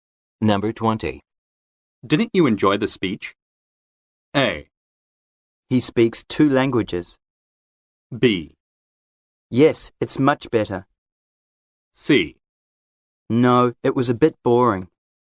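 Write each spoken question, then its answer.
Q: Didn't you enjoy the speech?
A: C: No, it was a bit boring.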